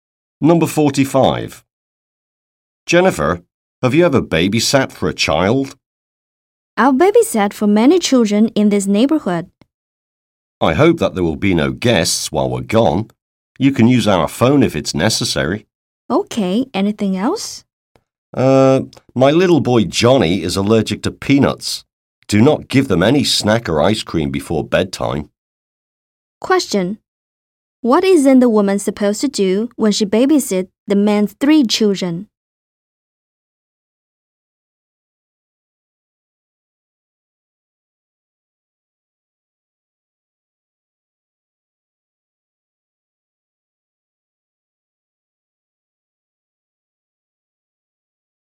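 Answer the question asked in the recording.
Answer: Give them snacks or ice cream before bedtime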